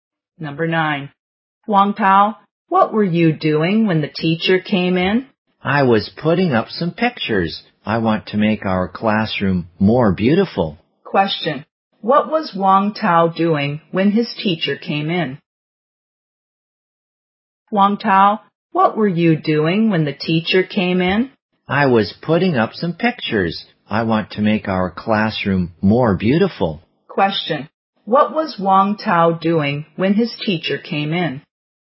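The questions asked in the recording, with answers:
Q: Question. What was Wang Tao doing when his teacher came in?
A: Putting up some pictures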